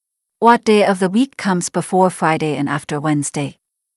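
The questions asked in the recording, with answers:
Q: What day of the week comes before Friday and after Wednesday?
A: Thursday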